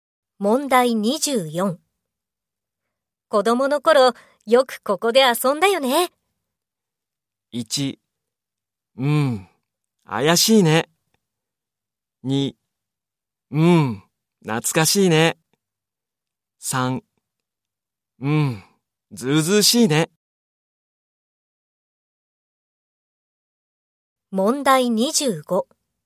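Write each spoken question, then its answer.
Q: 子供の頃、よくここで遊んだよね。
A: 2: うん、懐かしいね。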